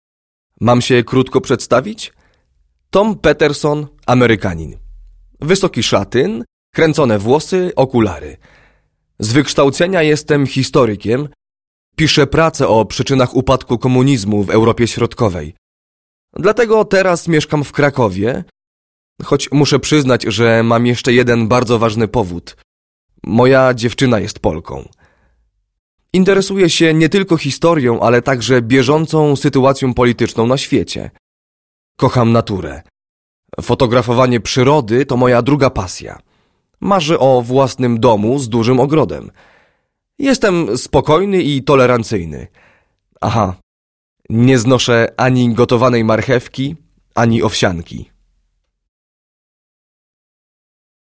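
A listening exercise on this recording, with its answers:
Proszę posłuchać i uzupełnić.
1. KIM JEST? (narodowość, zawód)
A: Amerykanin, historyk

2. JAKI JEST? (wygląd, charakter)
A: wysoki szatyn, kręcone włosy, okulary; spokojny i tolerancyjny

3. CZYM SIĘ INTERESUJE?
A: historią, bieżącą sytuacją polityczną na świecie, fotografowaniem przyrody

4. CO LUBI?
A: naturę, fotografowanie przyrody

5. KOGO LUB CZEGO NIE LUBI?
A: gotowanej marchewki i owsianki

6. O CZYM MARZY?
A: o własnym domu z dużym ogrodem

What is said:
Tom:
Mam się krótko przedstawić? Tom Peterson, Amerykanin. Wysoki szatyn, kręcone włosy, okulary. Z wykształcenia
jestem historykiem, piszę pracę o przyczynach upadku komunizmu w Europie Środkowej. Dlatego teraz mieszkam w
Krakowie, choć muszę przyznać, że mam jeszcze jeden bardzo ważny powód – moja dziewczyna jest Polką.
Interesuję się nie tylko historią, ale także bieżącą sytuacją polityczną na świecie. 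Kocham naturę. Fotografowanie
przyrody to moja druga pasja. Marzę o własnym domu z dużym ogrodem. Jestem spokojny i tolerancyjny. Aha, nie
znoszę ani gotowanej marchewki, ani owsianki.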